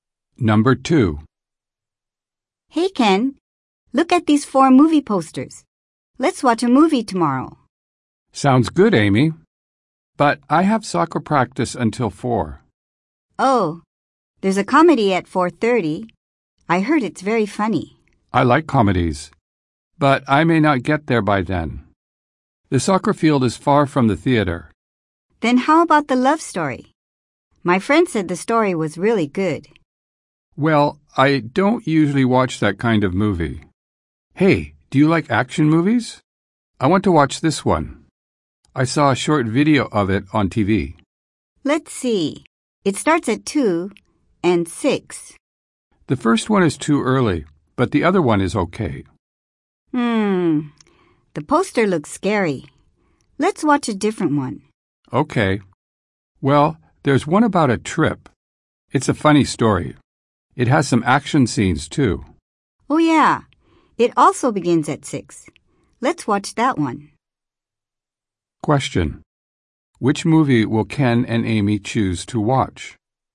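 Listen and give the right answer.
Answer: the funny movie about a trip, starting at 6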